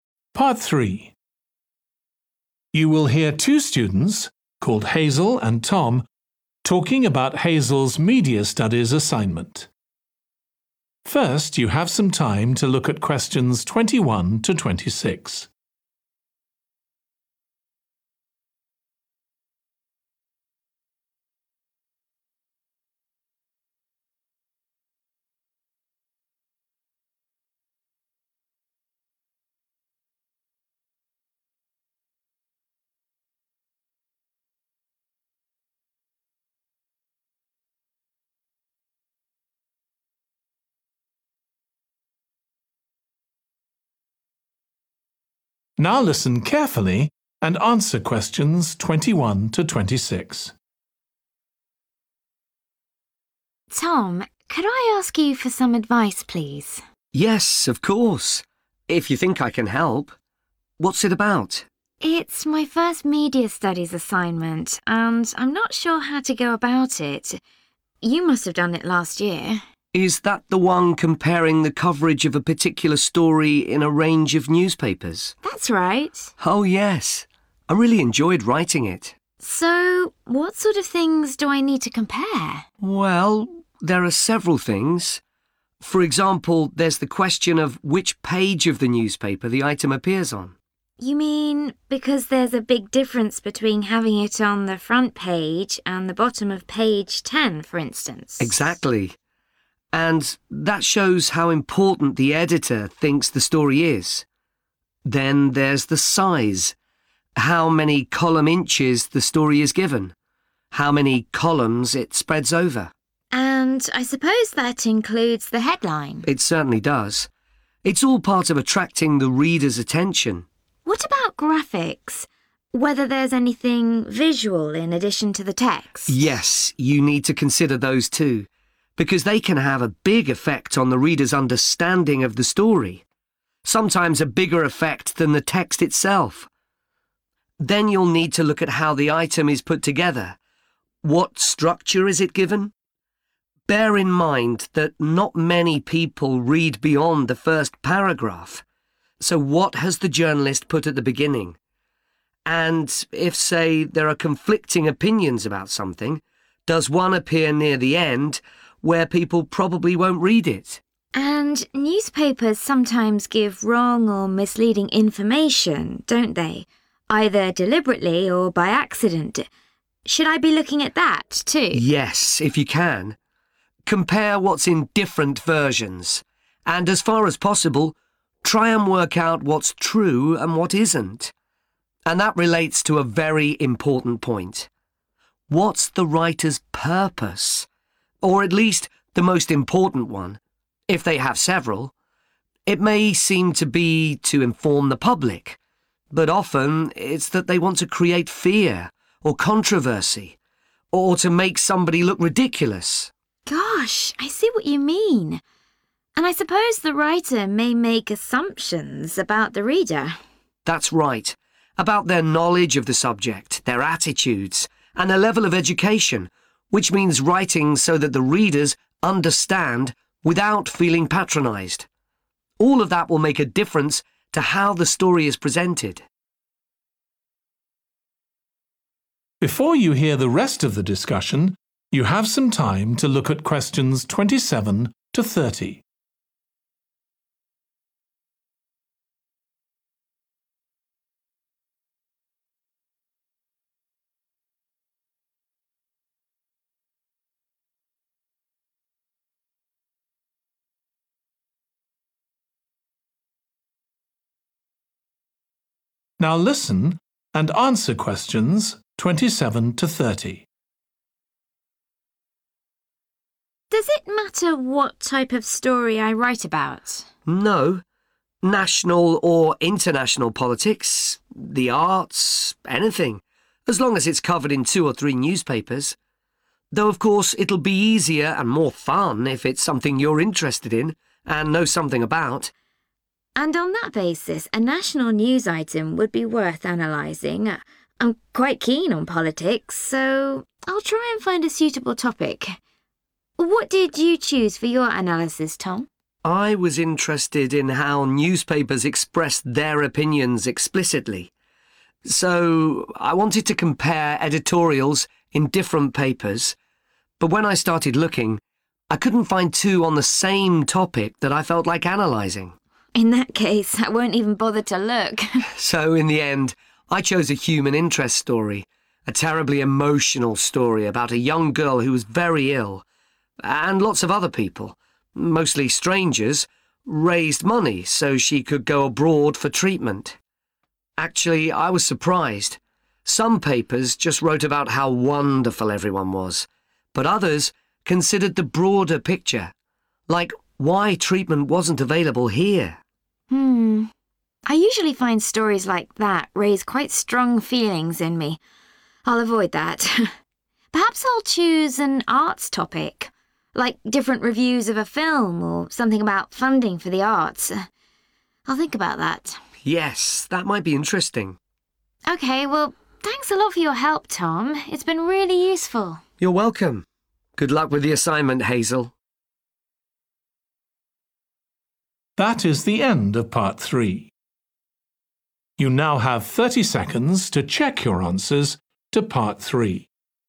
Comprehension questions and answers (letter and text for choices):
Complete the notes below. Write ONE WORD ONLY for each answer.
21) what _____ the item is on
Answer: page

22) the _____ of the item, including the headline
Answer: size

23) any _____ accompanying the item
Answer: graphic / graphics

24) the _____ of the item, e.g. what's made prominent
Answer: structure

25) the writer's main _____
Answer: purpose

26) the _____ the writer may make about the reader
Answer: assumption / assumptions

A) She will definitely look for a suitable article.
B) She may look for a suitable article.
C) She definitely won't look for an article.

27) national news item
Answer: A) She will definitely look for a suitable article.

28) editorial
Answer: C) She definitely won't look for an article.

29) human interest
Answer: C) She definitely won't look for an article.

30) arts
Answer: B) She may look for a suitable article.

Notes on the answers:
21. The correct answer is 'page' because it directly answers the question about what Hazel should analyse in a newspaper. Knowing the page helps understand the context and importance of the item.
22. The correct answer is 'size' because the excerpt says 'Then there's the size,' meaning that the size of something is important to analyze.
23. The correct answer 'graphic/graphics' fits the context as it refers to the visual elements that can include images, charts, or other visual aids that accompany newspaper articles. This is supported by the given excerpt asking about graphics.
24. The correct answer is 'structure' because it directly corresponds to analyzing how the item is presented, arranged, or organized in the newspaper context, which aligns with the idea of examining the format or structure of the news item mentioned in the excerpt.
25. The correct answer aligns with the importance of understanding the writer's purpose, as mentioned in the excerpt. By analyzing the writer's purpose, one can gain valuable insights into the overall message and intent of the newspaper items.
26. The correct answer is 'assumption' because it aligns with the notion that writers can make assumptions regarding the readers based on the content they write. In newspapers, writers may tailor their articles or content assuming certain characteristics, knowledge, or behaviors of their target audience.
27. The correct answer is 'A' because the excerpt clearly states that the person is willing to search for a suitable topic related to a national news item. Since she is interested in politics, she will make an effort to find an article on this subject.
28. The correct answer is C because the excerpt clearly states that Hazel struggled finding suitable editorials to compare. Therefore, she decided not to look for an article in this case.
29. The correct answer 'C' aligns with the statement in the excerpt where the individual clearly states that they won't bother to look, indicating a clear decision against seeking an article on human interest.
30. The correct answer is 'B' because although Hazel is thinking about choosing an arts topic, there is also a hint that she may not decide to look for such articles due to the strong feelings they evoke in her, leaving it uncertain whether she will definitely choose an arts topic or not.

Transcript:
HAZEL: Tom, could I ask you for some advice, please?
TOM: Yes of course, if you think I can help. What's it about?
HAZEL: It's my first media studies assignment, and I'm not sure how to go about it. You must have done it last year.
TOM: Is that the one comparing the coverage of a particular story in a range of newspapers?
HAZEL: That's right.
TOM: Oh yes, I really enjoyed writing it.
HAZEL: So what sort of things do I need to compare?
TOM: Well, there are several things. For example, there's the question of which page of the newspaper the item appears on.
HAZEL: You mean, because there's a big difference between having it on the front page and the bottom of page ten, for instance?
TOM: Exactly. And that shows how important the editor thinks the story is. Then there's the size – how many column inches the story is given, how many columns it spreads over.
HAZEL: And I suppose that includes the headline.
TOM: It certainly does. It's all part of attracting the reader's attention.
HAZEL: What about graphics – whether there's anything visual in addition to the text?
TOM: Yes, you need to consider those, too, because they can have a big effect on the reader's understanding of the story – sometimes a bigger effect than the text itself. Then you'll need to look at how the item is put together: what structure is it given? Bear in mind that not many people read beyond the first paragraph, so what has the journalist put at the beginning? And if, say, three are conflicting opinions about something, does one appear near the end, where people probably won't read it?
HAZEL: And newspapers sometimes give wrong or misleading information, don't they?
Either deliberately or by accident. Should I be looking at that, too?
TOM: Yes, if you can. Compare what's in different versions, and as far as possible, try and work out what's true and what isn't. And that relates to a very important point: what's the writer's purpose, or at least the most important one, if they have several. It may seem to be to inform the public, but often it's that they want to create fear, or controversy, or to make somebody look ridiculous.
HAZEL: Gosh, I see what you mean. And I suppose the writer may make assumptions about the reader.
TOM: That's right – about their knowledge of the subject, their attitudes, and their level of education, which means writing so that the readers understand without feeling patronised. All of that will make a difference to how story is presented.
HAZEL: Does it matter what type of story I write about?
TOM: No – national or international politics, the arts ... Anything, as long as it's covered in two or three newspaper. Though of course it'll be easier and more fun if it's something you're interested in and know something about.
HAZEL: And on that basis a national news item would be worth analysing – I'm quite keen on politics, so I'll try and find a suitable topic. What did you choose for your analysis, Tom?
TOM: I was interested in how newspapers express their opinions explicitly, so I wanted to compare editorials in different papers, but when I started looking. I couldn't find two on the same topic that I felt like analysing.
HAZEL: In that case, I won't even bother to look.
TOM: So in the end I chose a human interest story – a terribly emotional story about a young girl who was very ill, and lots of other people – mostly strangers – raised money so she could go abroad for treatment. Actually, I was surprised – some papers just wrote about how wonderful everyone was, but others considered the broader picture, like why treatment wasn't available here.
HAZEL: Hmm, I usually find stories like that raise quite strong feelings in me! I'll avoid that. Perhaps I'll choose an arts topic, like different reviews of a film, or something about funding for the arts – I'll think about that.
TOM: Yes, that might be interesting.
HAZEL: OK, well thanks a lot for your help, Tom. It's been really useful.
TOM: You're welcome. Good luck with the assignment, Hazel.